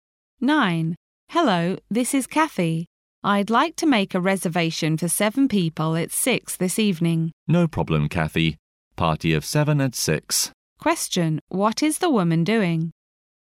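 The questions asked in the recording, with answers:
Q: What is the woman doing?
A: Booking a table for 7 people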